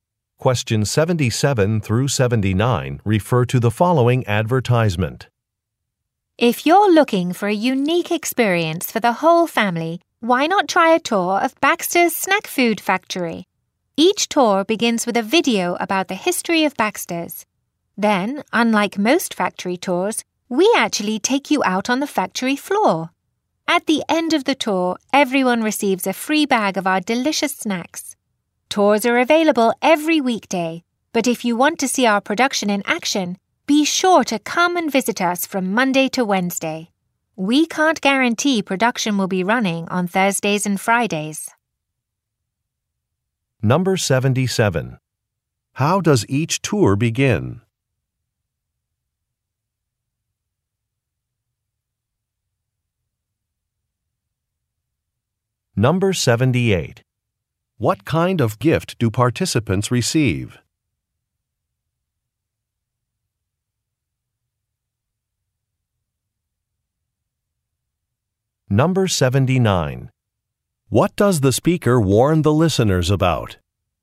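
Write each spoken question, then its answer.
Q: How does each tour begin?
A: With a video about the company's history

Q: What kind of gift do participants receive?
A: A free bag of snacks

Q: What does the speaker warn the listeners about?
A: Production may not be running on Thursdays and Fridays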